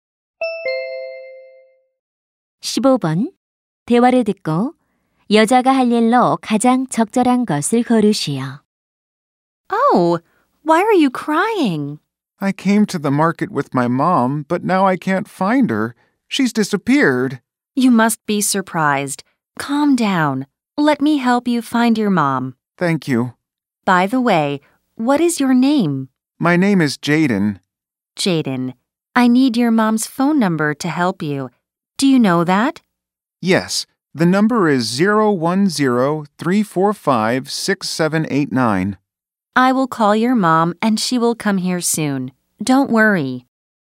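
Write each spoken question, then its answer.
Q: 대화를 듣고 여자가 할 일로 가장 적절한 것을 고르시오.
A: 아이의 엄마에게 전화하기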